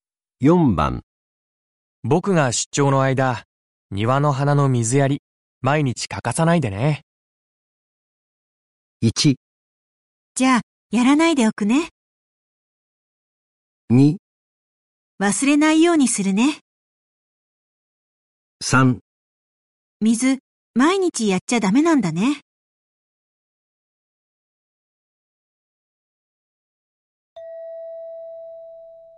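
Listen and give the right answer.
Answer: 2: 忘れないようにするね。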